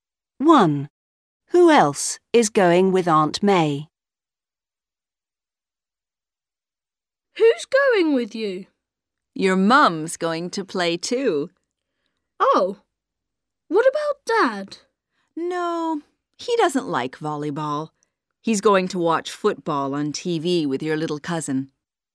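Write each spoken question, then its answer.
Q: Who else is going with Aunt May?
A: Your mum (Tom's mum)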